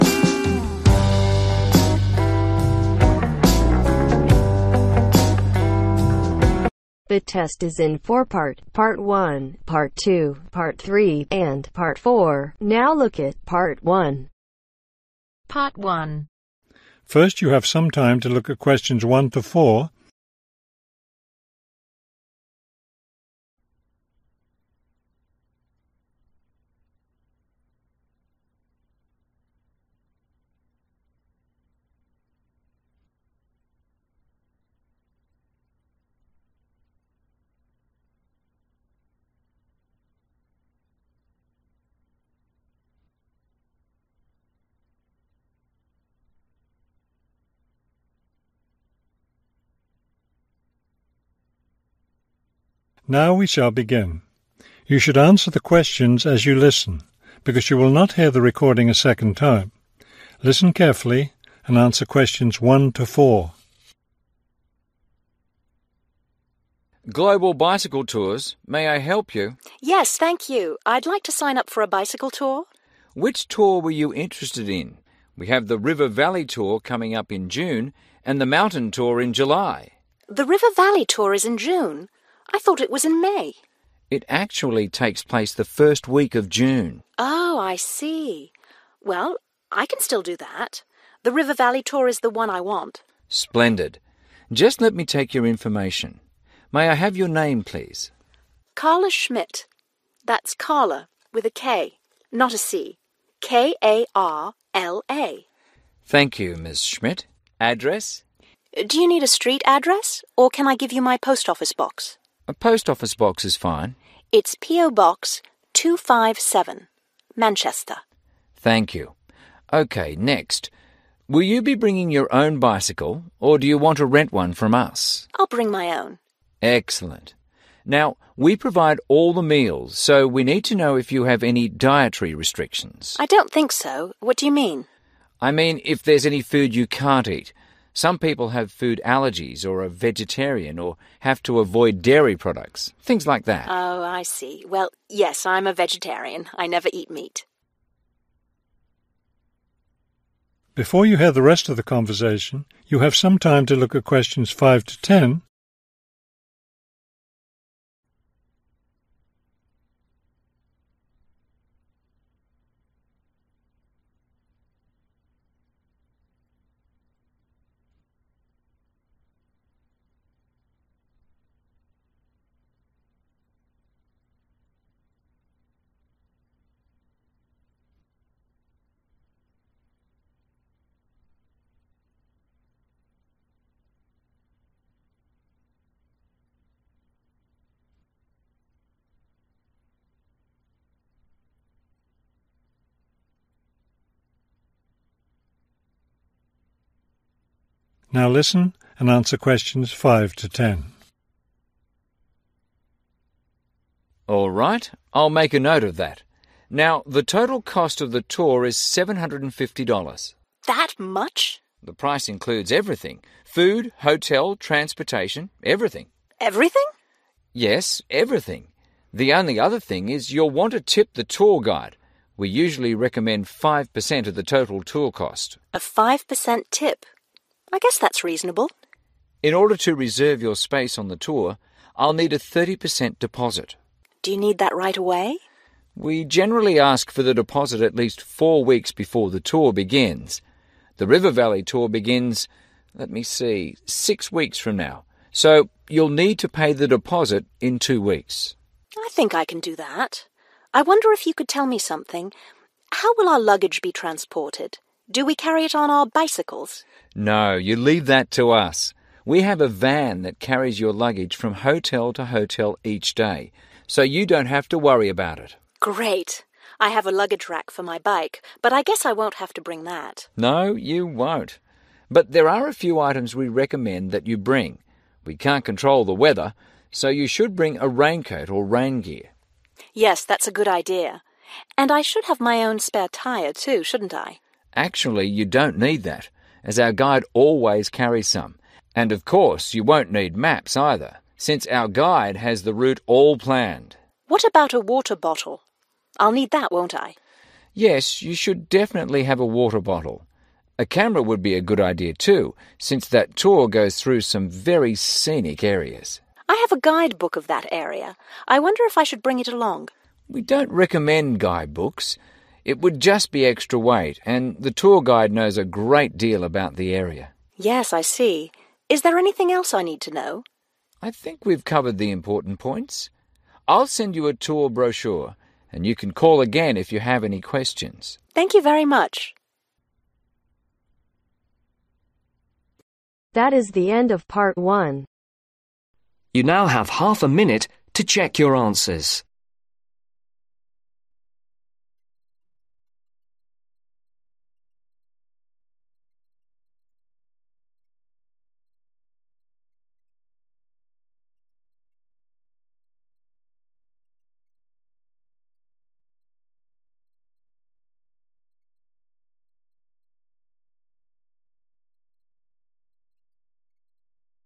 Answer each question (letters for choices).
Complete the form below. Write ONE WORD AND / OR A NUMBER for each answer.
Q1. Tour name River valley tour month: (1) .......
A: June

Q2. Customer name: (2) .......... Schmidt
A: Karla

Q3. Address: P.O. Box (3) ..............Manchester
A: 257

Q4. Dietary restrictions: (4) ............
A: Vegetarian

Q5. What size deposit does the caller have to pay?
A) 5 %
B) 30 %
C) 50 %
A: B

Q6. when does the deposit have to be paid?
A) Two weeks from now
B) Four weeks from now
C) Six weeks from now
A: A

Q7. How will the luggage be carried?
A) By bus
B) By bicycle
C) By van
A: C